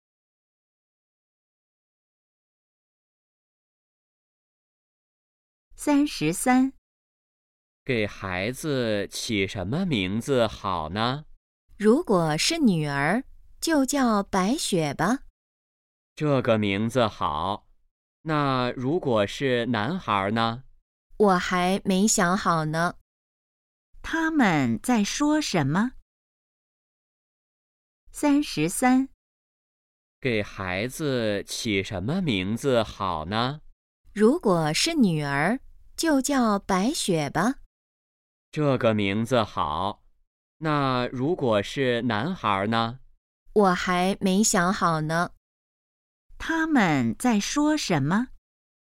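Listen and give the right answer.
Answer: 给孩子起名字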